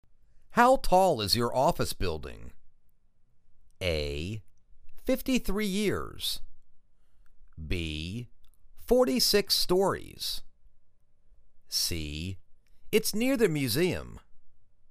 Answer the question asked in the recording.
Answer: Forty-six 46 stories.